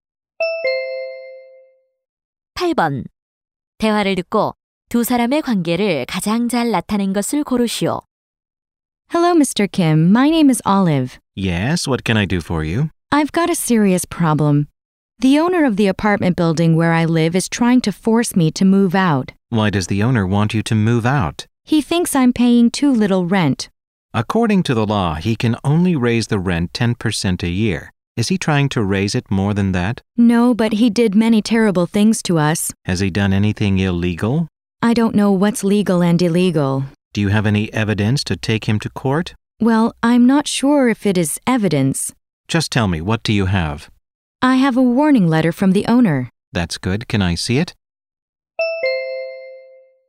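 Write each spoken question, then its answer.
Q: 대화를 듣고 두 사람의 관계를 가장 잘 나타낸 것을 고르시오.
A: 변호사 - 의뢰인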